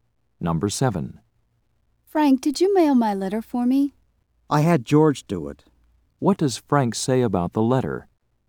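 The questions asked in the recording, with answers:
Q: What does Frank say about the letter?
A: George mailed it.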